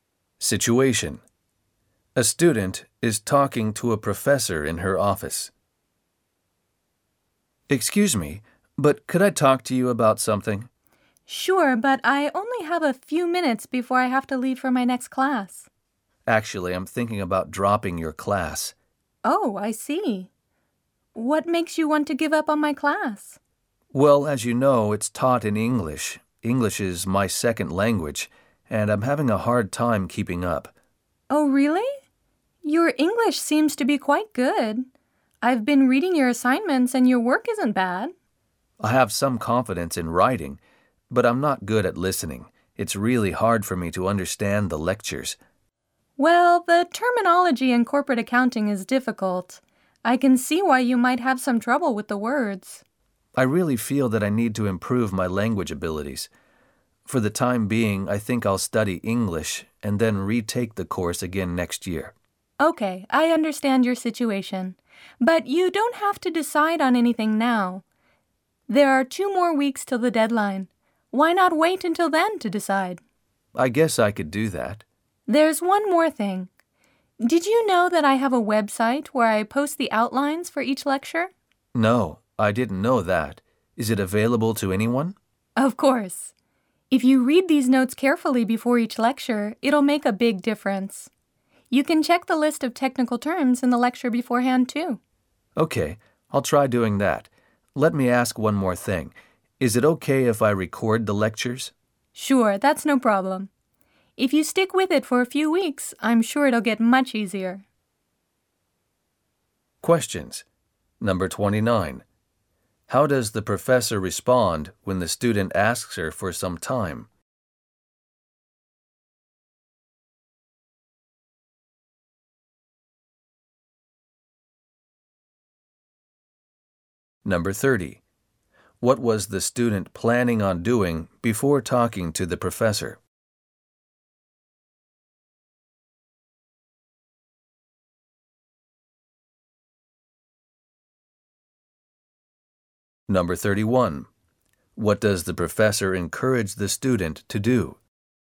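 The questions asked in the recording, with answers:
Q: How does the professor respond when the student asks her for some time?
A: She agrees, but says she only has a few minutes before her next class.

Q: What was the student planning on doing before talking to the professor?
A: Dropping the class to study English, then retaking it next year.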